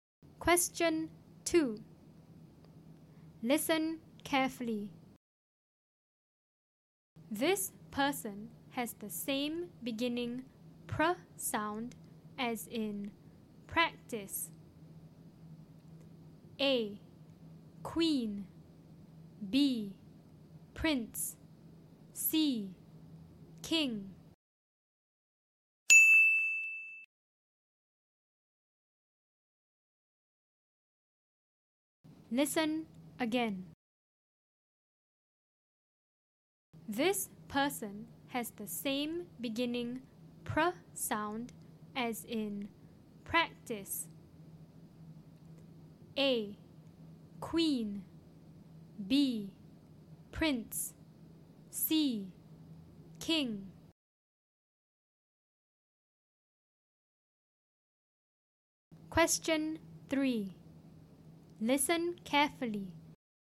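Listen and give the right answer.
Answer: B: prince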